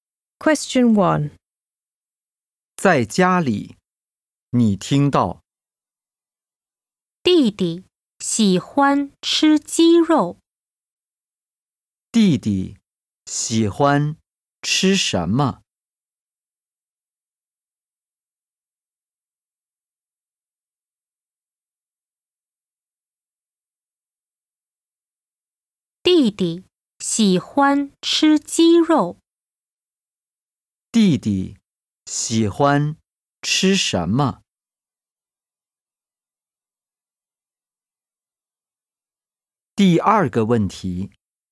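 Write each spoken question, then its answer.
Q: 弟弟喜欢吃什么?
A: 鸡肉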